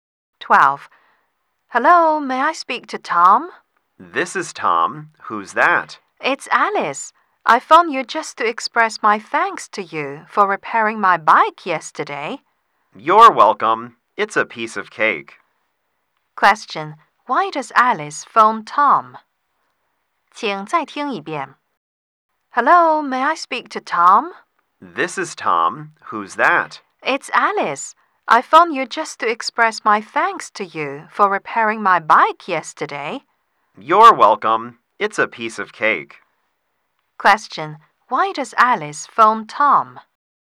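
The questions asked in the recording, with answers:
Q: Why does Alice phone Tom?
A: To thank him for repairing her bike.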